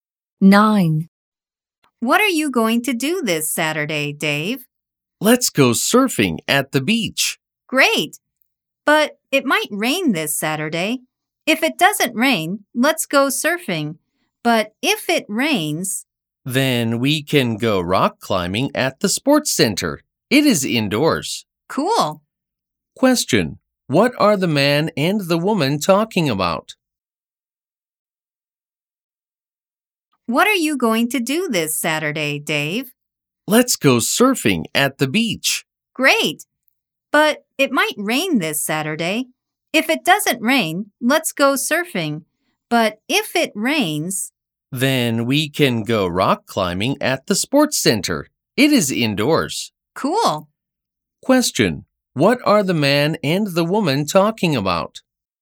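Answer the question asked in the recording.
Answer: Their plans for this Saturday (surfing, or rock climbing if it rains)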